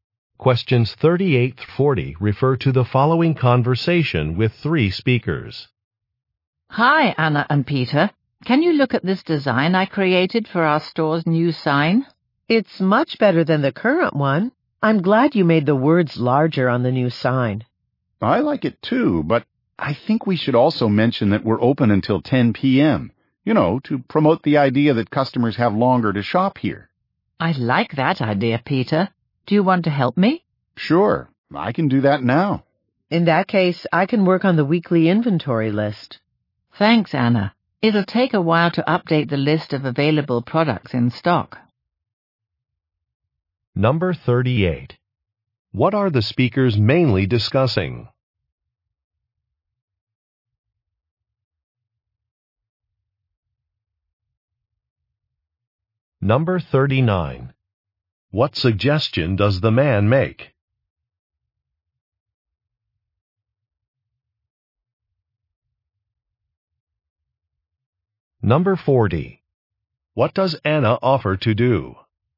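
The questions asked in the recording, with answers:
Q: What are the speakers mainly discussing?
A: A new sign for their store

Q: What suggestion does the man make?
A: Mention on the sign that the store is open until 10 p.m.

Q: What does Anna offer to do?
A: Work on the weekly inventory list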